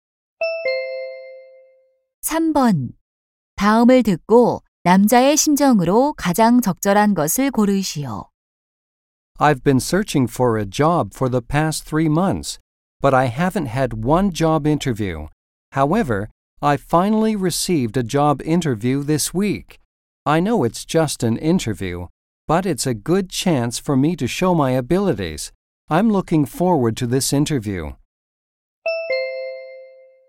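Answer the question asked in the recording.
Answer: 기대감 (설렘)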